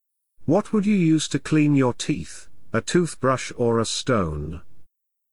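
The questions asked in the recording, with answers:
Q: What would you use to clean your teeth, a toothbrush or a stone?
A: A toothbrush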